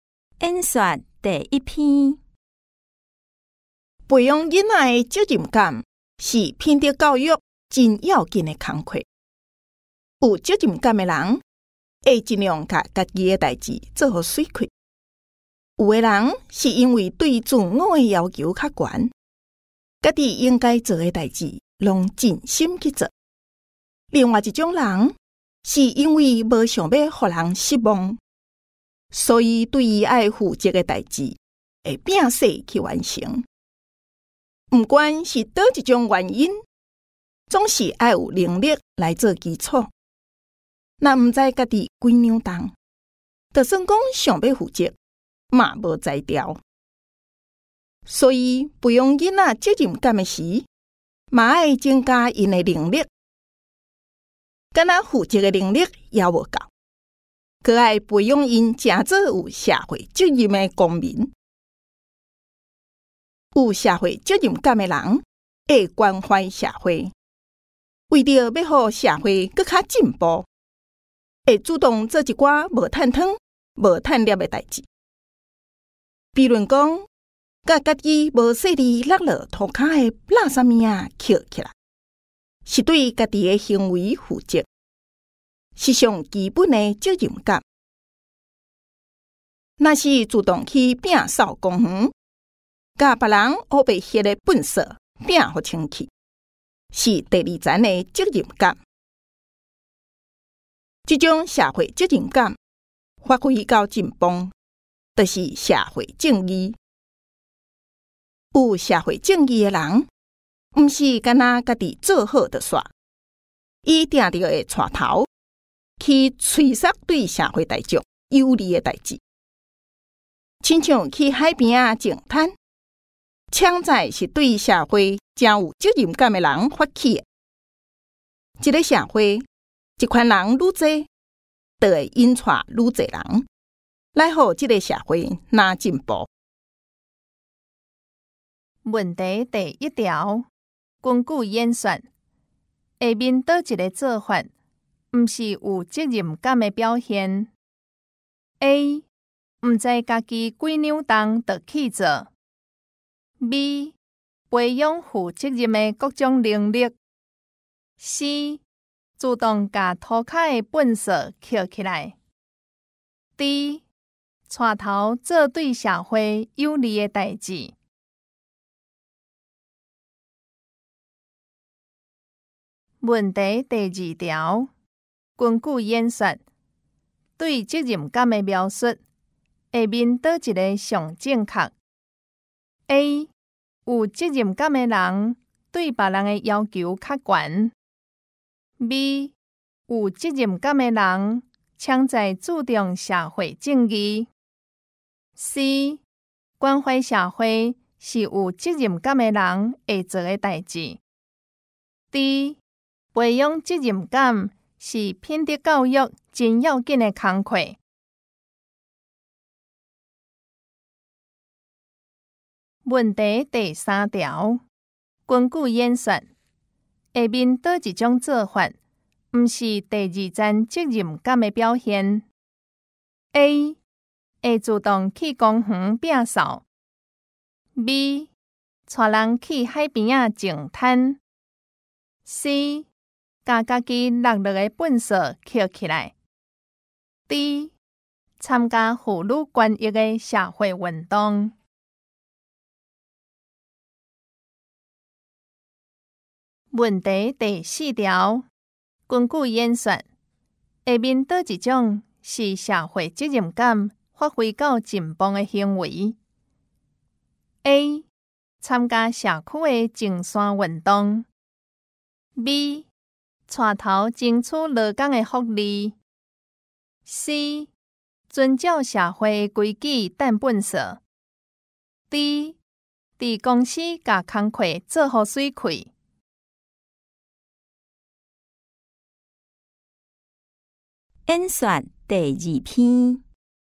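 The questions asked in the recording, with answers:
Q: 根据演算,下面倒一个做法,不是有责任感的表现。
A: A: 不知家己几扭动就去做

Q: 根据演算,对责任感的描述,下面倒一个上正确。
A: D: 培养责任感是品德教育真要紧的工课

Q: 根据演算,下面倒一种做法,不是第二层责任感的表现。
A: C: 把自己落下的粪扫捡起来

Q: 根据演算,下面倒一种是社会责任感发挥到紧绷的行为。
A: B: 带头争取劳工的福利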